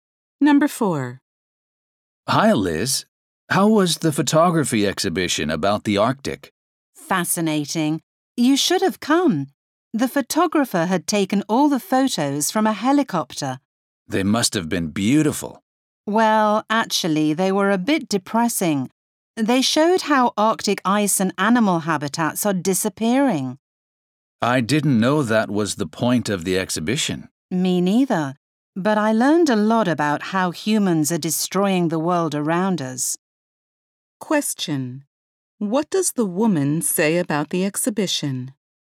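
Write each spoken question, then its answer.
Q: What does the woman say about the exhibition?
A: It showed how humans are destroying the Arctic, so it was a bit depressing.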